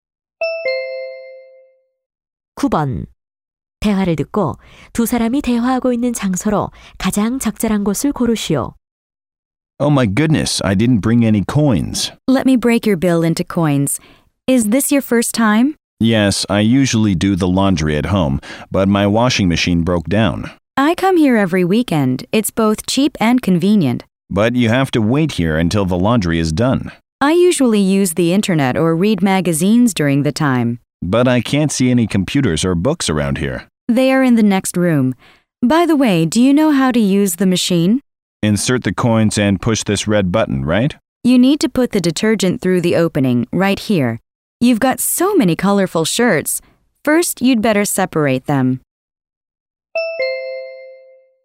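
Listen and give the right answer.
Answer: 빨래방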